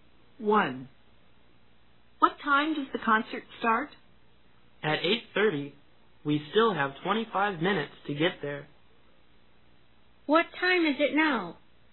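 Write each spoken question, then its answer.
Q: What time is it now?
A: 8:05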